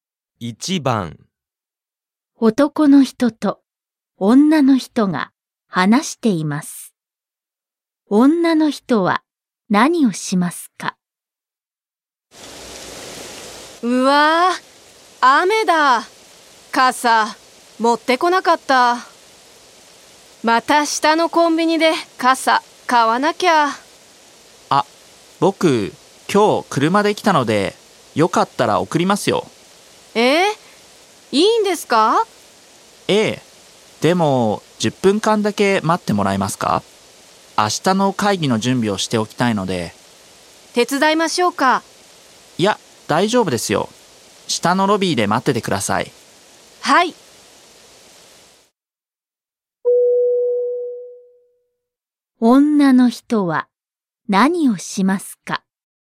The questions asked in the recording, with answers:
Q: 女の人は何をしますか?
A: 4, choice 4, ロビーに行く。